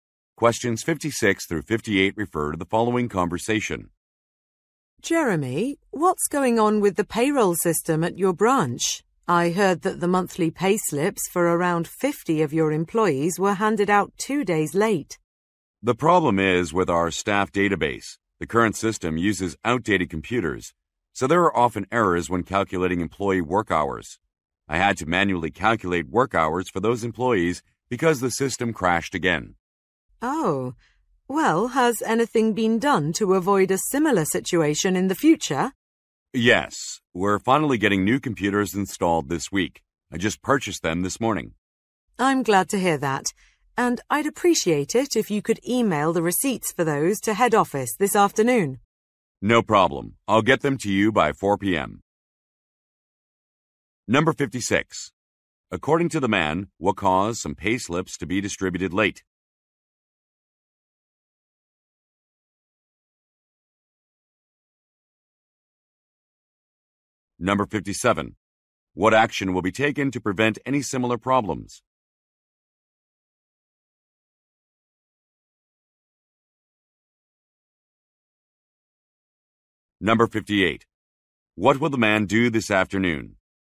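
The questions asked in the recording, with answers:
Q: According to the man, what caused some payslips to be distributed late?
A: An outdated computer system that crashed

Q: What action will be taken to prevent any similar problems?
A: New computers will be installed

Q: What will the man do this afternoon?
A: Email the receipts to head office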